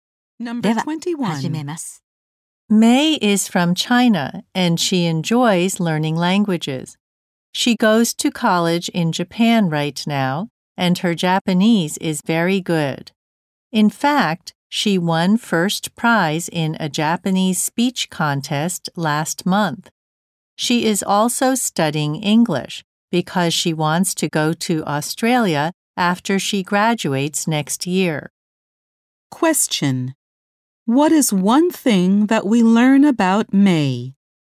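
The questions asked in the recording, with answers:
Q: What is one thing that we learn about May?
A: She won first prize in a Japanese speech contest.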